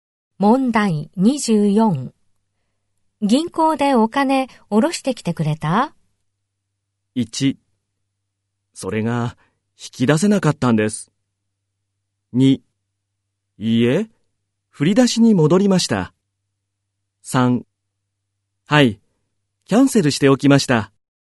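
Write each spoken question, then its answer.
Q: 銀行でお金下ろしてきてくれた?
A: 1: それが引き出せなかったんです。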